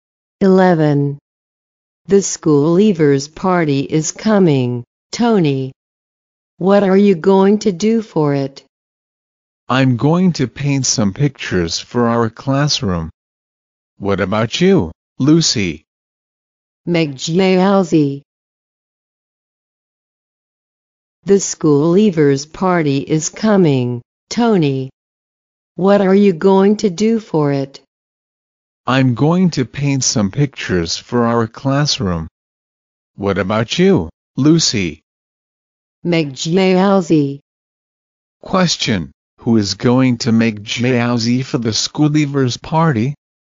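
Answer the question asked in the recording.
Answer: Lucy.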